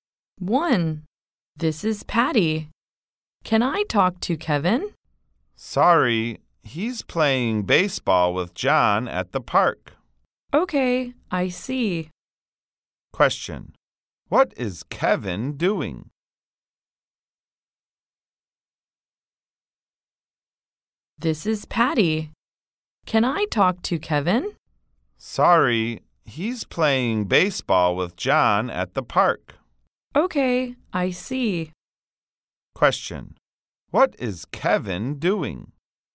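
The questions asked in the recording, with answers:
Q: What is Kevin doing?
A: Playing baseball with John at the park.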